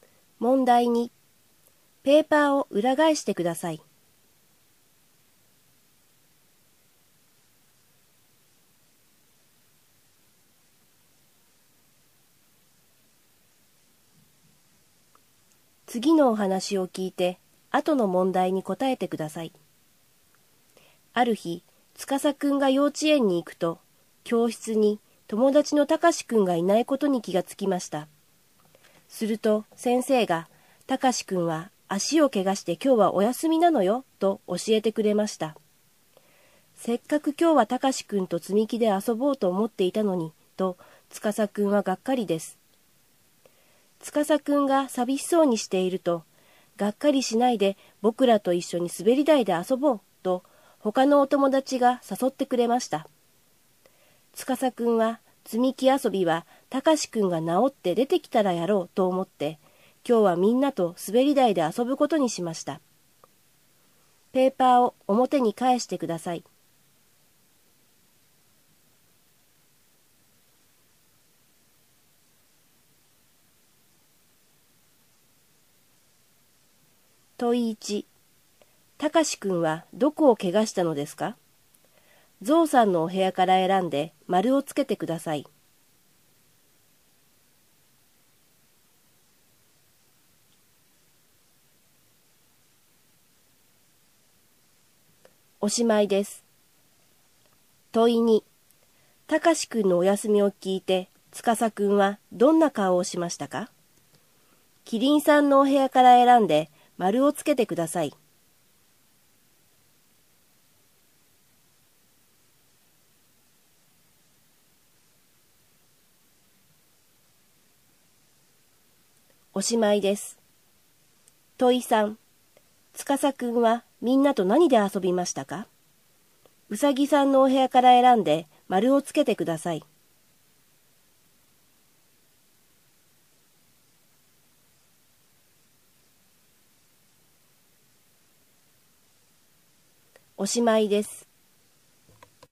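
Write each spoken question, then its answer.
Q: たかしくんのお休みを聞いて、司くんはどんな顔をしましたか?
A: がっかりした寂しそうな顔

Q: 司くんはみんなと何で遊びましたか?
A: 滑り台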